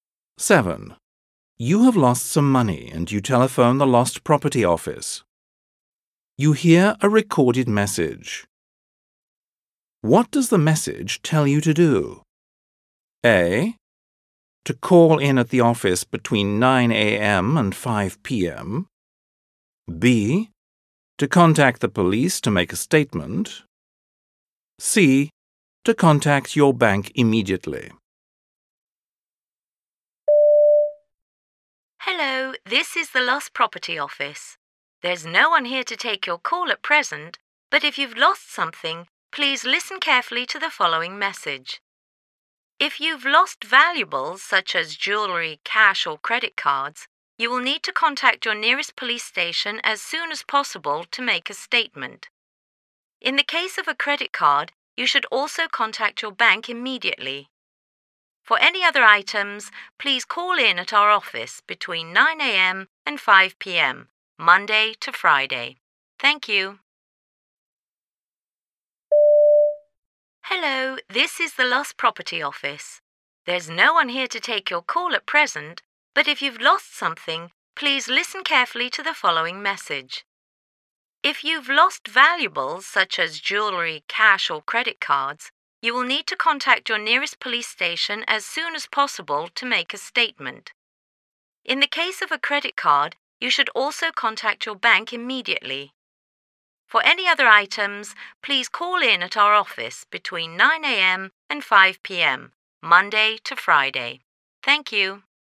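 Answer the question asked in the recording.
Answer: B: To contact the police to make a statement.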